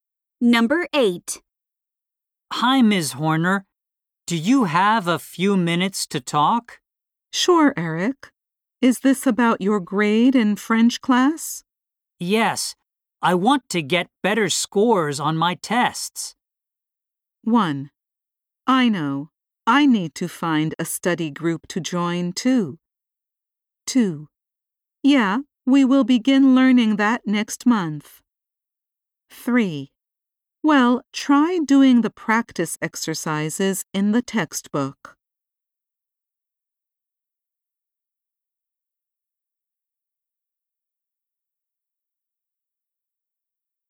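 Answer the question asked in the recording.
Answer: 3: Well, try doing the practice exercises in the textbook.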